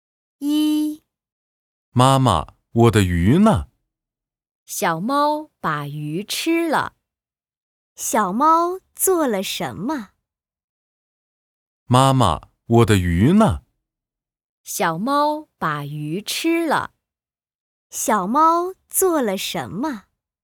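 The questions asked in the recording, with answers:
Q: 小猫做了什么?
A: 把鱼吃了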